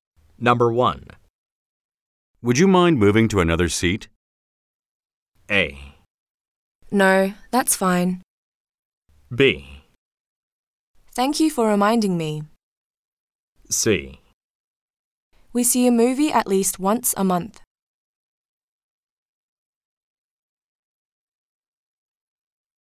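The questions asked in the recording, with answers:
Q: Would you mind moving to another seat?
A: A: No, that's fine.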